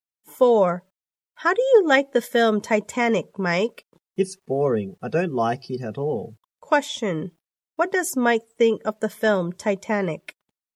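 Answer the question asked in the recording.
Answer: It's boring; he doesn't like it at all.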